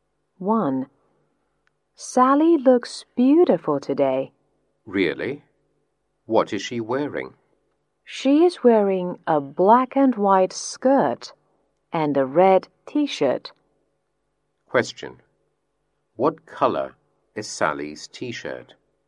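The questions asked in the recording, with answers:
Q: What color is Sally's t-shirt?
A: Red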